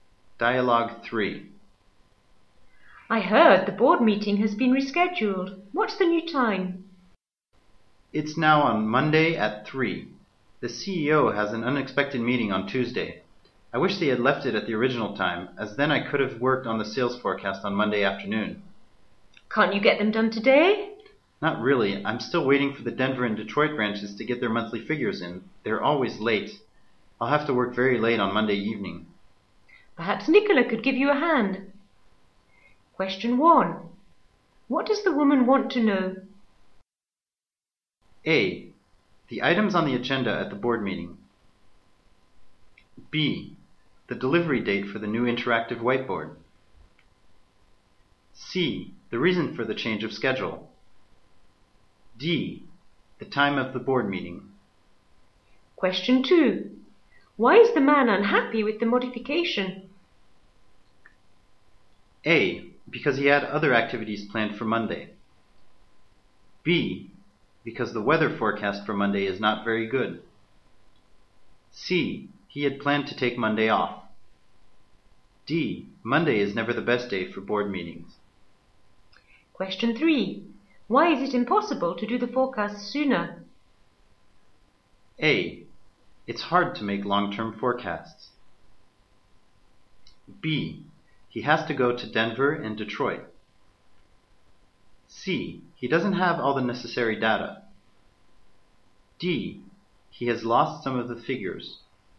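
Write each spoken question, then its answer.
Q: What does the woman want to know?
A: D: The time of the board meeting.

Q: Why is the man unhappy with the modification?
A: A: Because he had other activities planned for Monday.

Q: Why is it impossible to do the forecast sooner?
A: C: He doesn't have all the necessary data.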